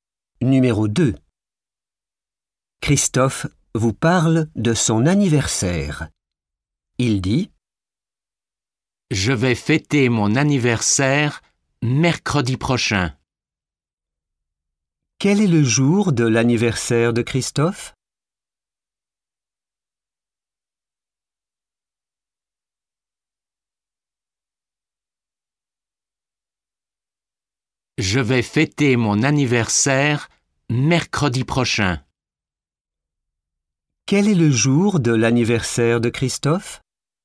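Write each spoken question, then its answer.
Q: Quel est le jour de l'anniversaire de Christophe?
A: mercredi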